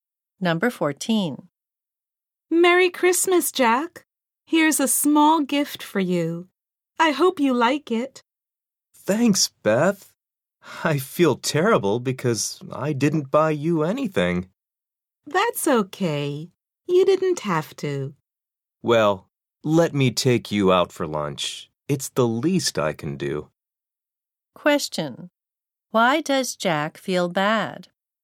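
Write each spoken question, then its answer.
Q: Why does Jack feel bad?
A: He didn't buy Beth a gift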